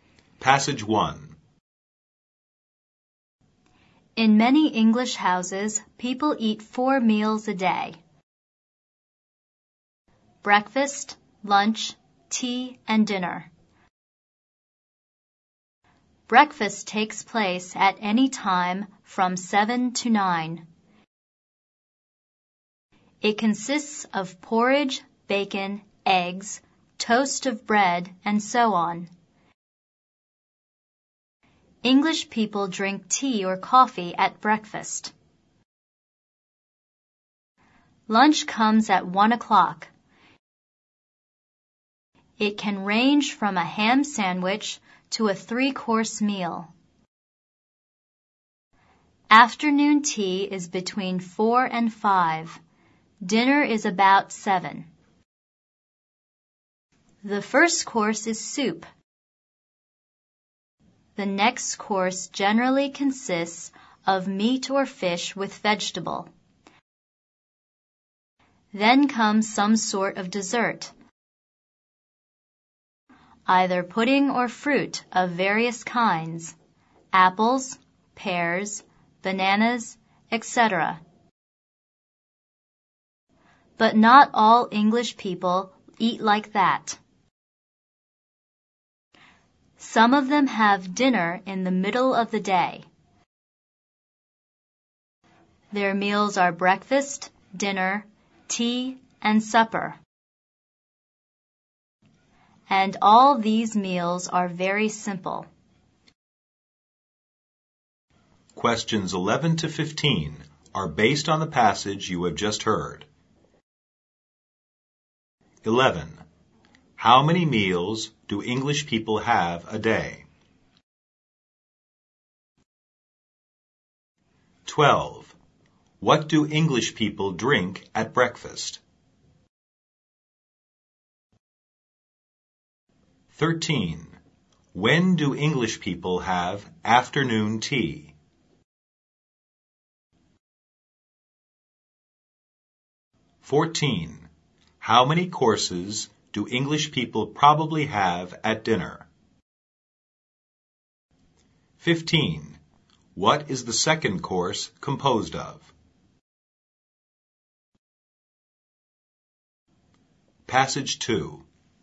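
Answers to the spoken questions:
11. Four
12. Tea or coffee
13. Between 4 and 5
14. Three
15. Meat or fish with vegetables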